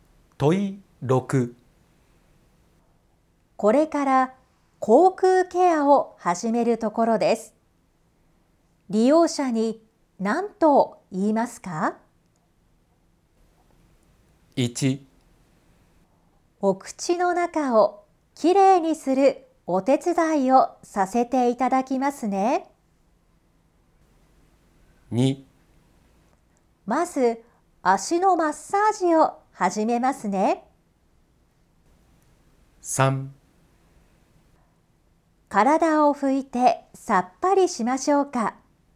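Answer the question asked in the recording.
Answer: 1: お口の中をきれいにするお手伝いをさせていただきますね。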